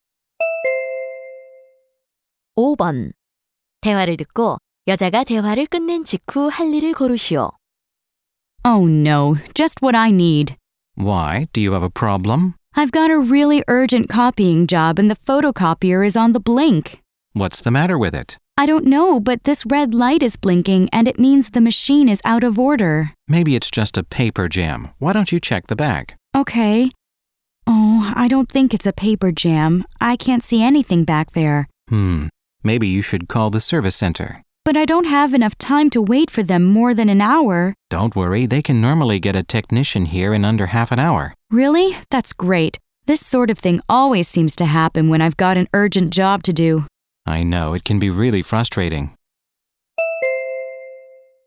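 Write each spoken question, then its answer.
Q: 대화를 듣고 여자가 대화를 끝낸 직후 할 일을 고르시오.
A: 서비스 센터에 전화하기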